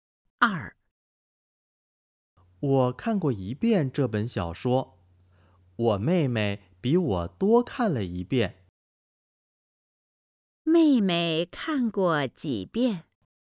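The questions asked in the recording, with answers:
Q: 妹妹看过几遍?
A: 两遍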